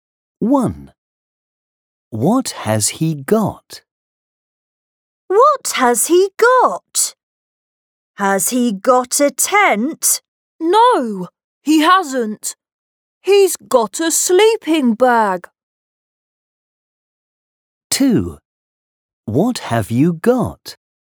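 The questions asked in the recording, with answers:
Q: What has he got?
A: A sleeping bag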